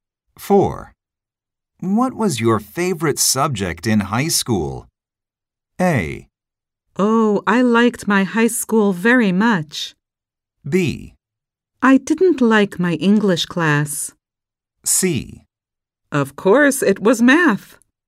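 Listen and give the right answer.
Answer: C: Of course, it was math.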